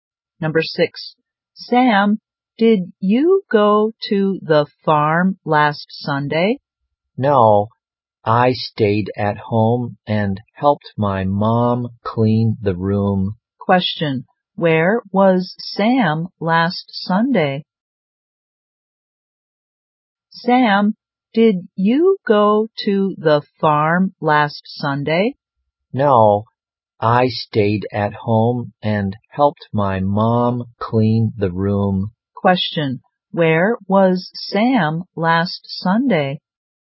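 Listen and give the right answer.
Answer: At home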